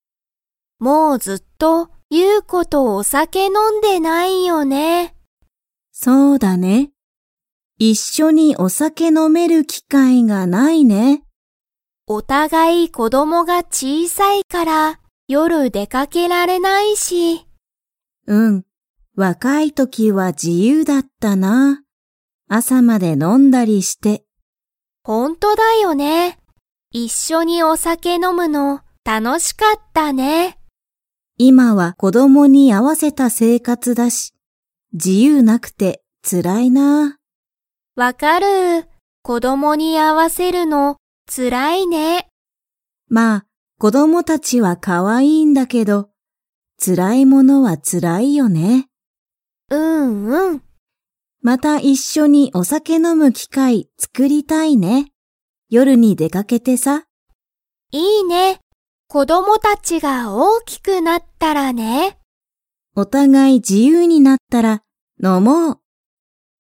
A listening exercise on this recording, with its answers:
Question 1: ナオとユウコの子こどもは 。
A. 小ちいさい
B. 小ちいさくない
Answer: 小ちいさい

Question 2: 二人ふたりは、何なにがなくてつらいですか?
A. 子こども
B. 仕事しごと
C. お酒さけ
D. 自由じゆう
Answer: 自由じゆう

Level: Level 3

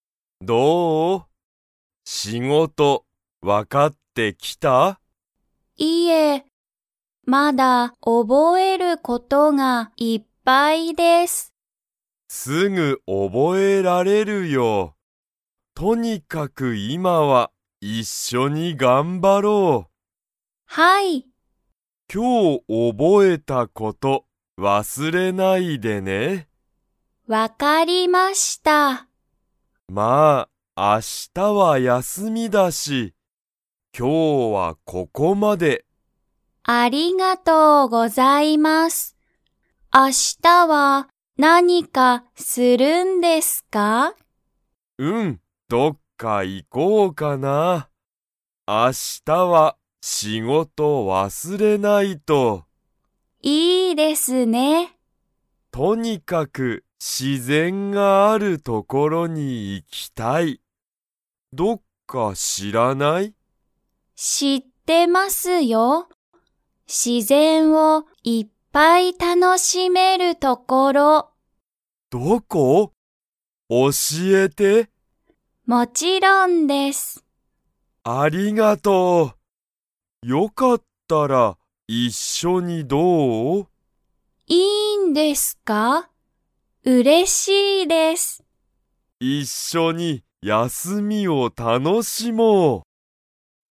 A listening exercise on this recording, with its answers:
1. ゆいは、____事(こと)がいっぱいある。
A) 忘(わす)れる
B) 覚(おぼ)える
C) 楽(たの)しむ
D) 教(おし)える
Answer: 覚(おぼ)える

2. ゆいは、自然(しぜん)を楽(たの)しめるところを知(し)っていますか?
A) はい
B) いいえ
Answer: はい

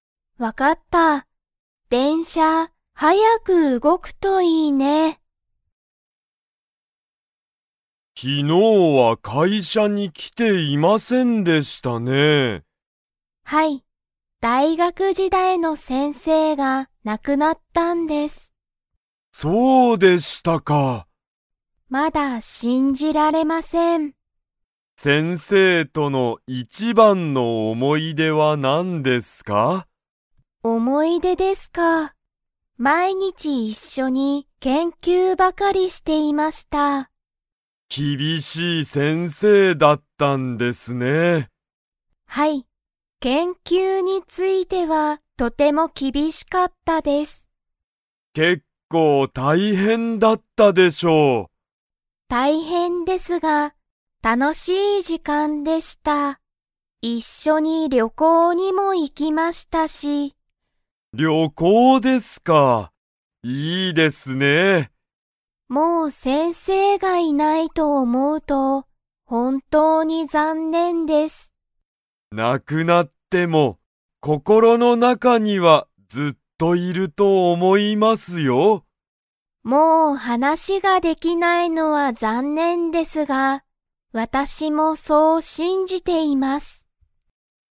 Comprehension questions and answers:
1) 赤木あかぎさんは昨日きのう会社かいしゃに 。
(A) 来きていた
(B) 来きていなかった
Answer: 来きていなかった

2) 先生せんせいとは、毎日まいにち何なにをしていましたか?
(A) 旅行りょこう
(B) 仕事しごと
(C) 研究けんきゅう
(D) 話はなし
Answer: 研究けんきゅう

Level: Level 3

